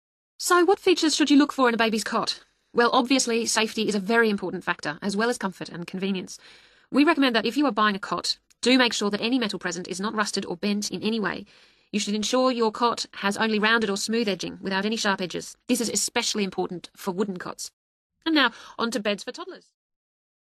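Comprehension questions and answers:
Complete the notes below. Write ONE WORD ONLY for the answer.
Edges of cot should not be ...........................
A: sharp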